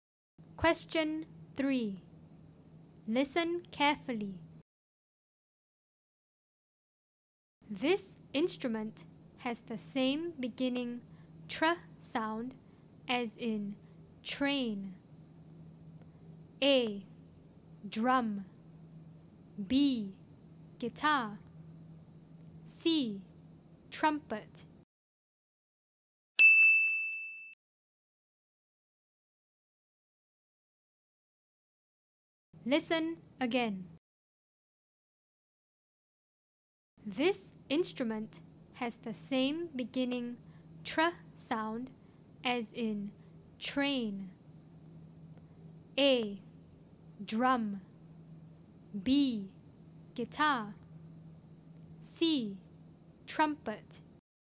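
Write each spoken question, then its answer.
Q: This instrument has the same beginning tr sound as in train.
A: C: Trumpet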